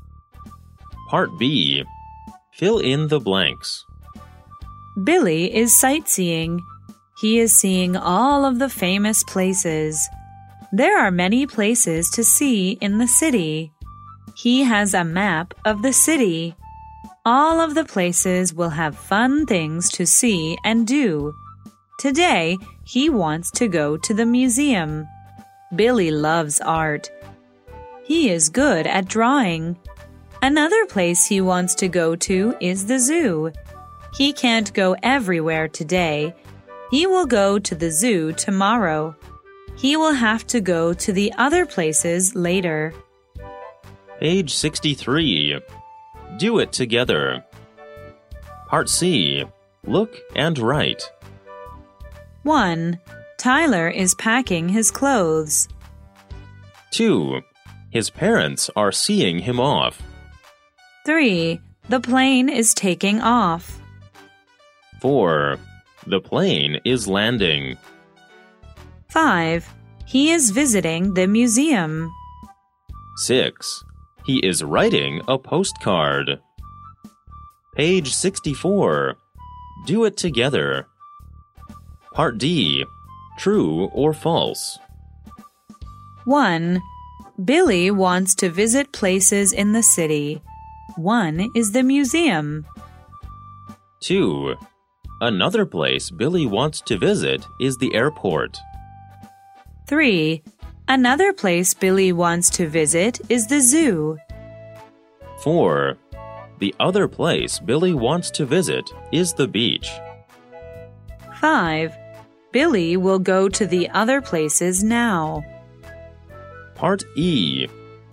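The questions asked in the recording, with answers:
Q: Billy wants to visit places in the city. 1 is the museum.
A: True

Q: Another place Billy wants to visit is the airport.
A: False

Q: Another place Billy wants to visit is the zoo.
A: True

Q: Billy will go to the other places now.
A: False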